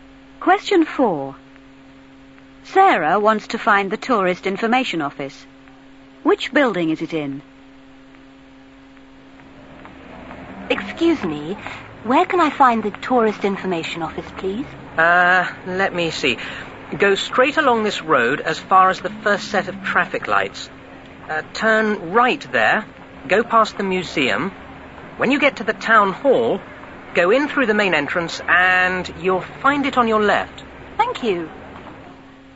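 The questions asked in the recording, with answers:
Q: Which building is it in?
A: The town hall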